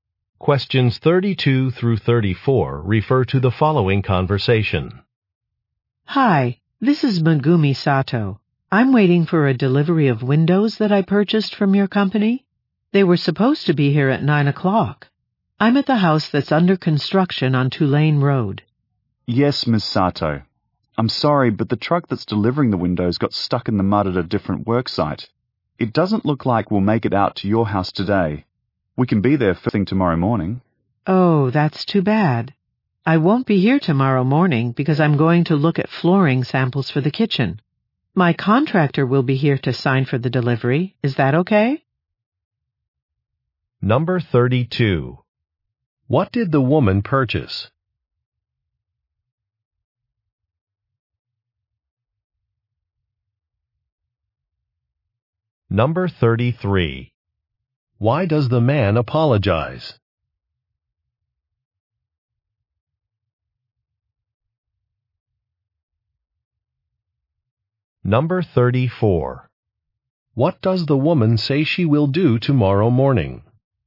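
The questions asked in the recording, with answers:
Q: What did the woman purchase?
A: Windows

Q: Why does the man apologize?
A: The delivery truck got stuck in mud, so the delivery will be late

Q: What does the woman say she will do tomorrow morning?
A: Look at flooring samples for the kitchen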